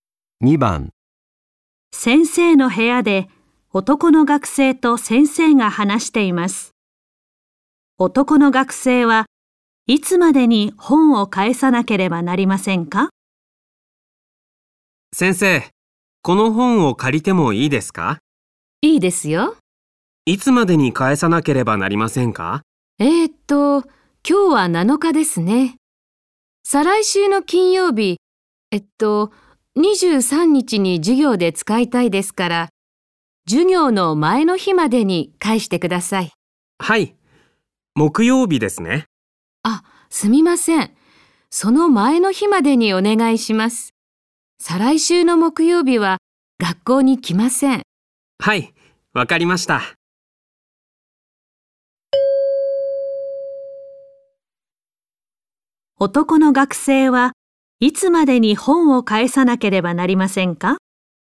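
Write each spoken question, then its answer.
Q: 男の学生はいつまでに本を返さなければなりませんか?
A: 再来週の水曜日(21日)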